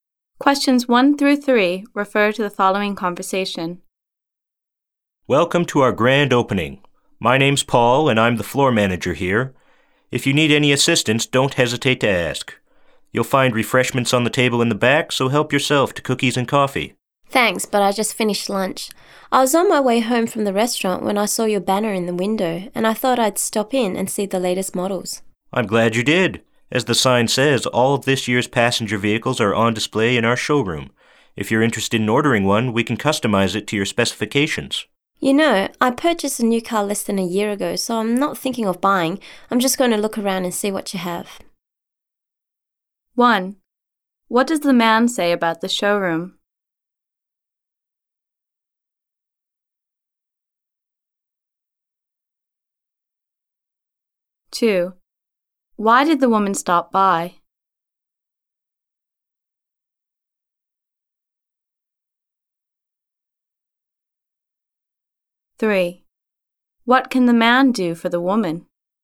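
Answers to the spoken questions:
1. All of this year's passenger vehicles are on display there.
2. She saw the banner and wanted to see the latest models.
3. Customize a vehicle to her specifications.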